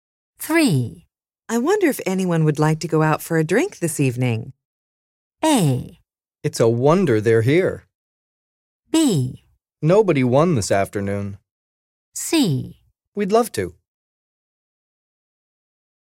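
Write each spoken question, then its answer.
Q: I wonder if anyone would like to go out for a drink this evening.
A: C: We'd love to.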